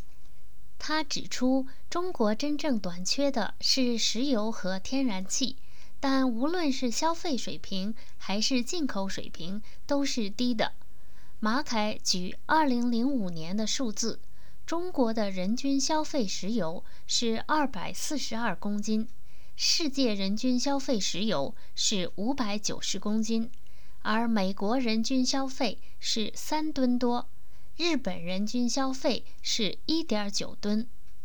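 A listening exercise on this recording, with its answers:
Please answer the following questions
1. How many kilograms was the world-wide fossil oil consumption per person in 2005?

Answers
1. 590 kilograms

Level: M.Phil Year 2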